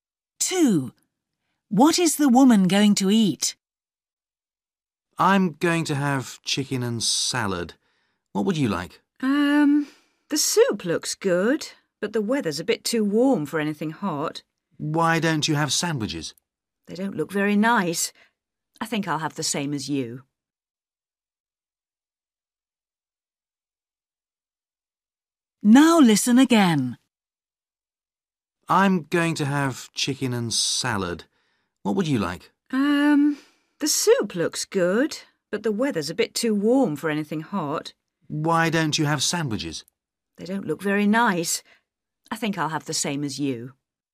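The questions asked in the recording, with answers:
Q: What is the woman going to eat?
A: Chicken and salad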